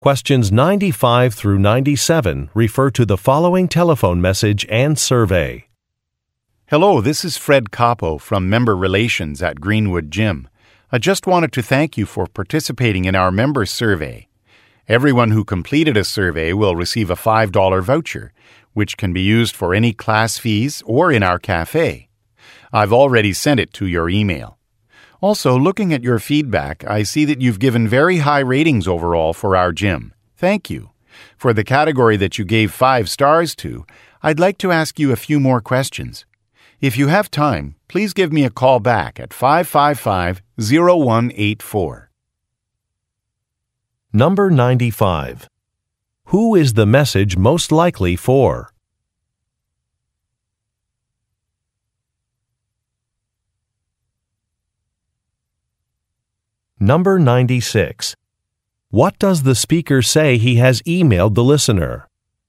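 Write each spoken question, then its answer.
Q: Who is the message most likely for?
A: A gym member who completed a survey

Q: What does the speaker say he has emailed the listener?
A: A $5 voucher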